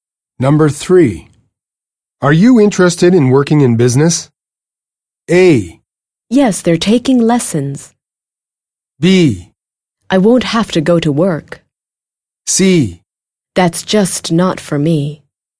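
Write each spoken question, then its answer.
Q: Are you interested in working in business?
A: C: That's just not for me.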